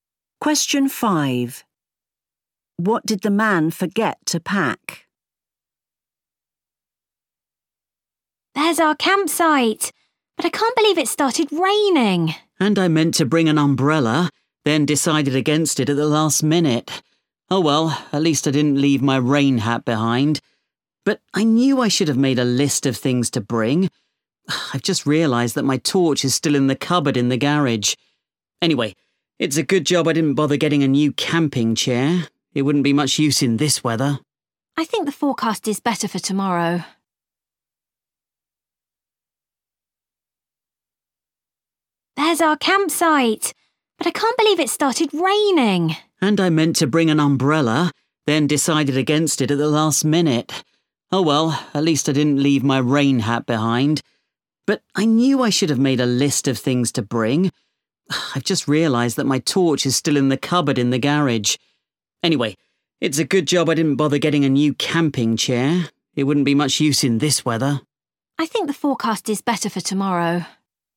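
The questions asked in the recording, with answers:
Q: What did the man forget to pack?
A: His torch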